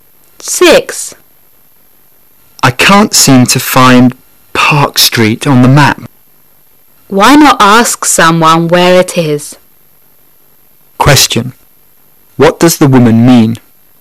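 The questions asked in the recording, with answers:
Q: What does the woman mean?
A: The man should ask someone where Park Street is.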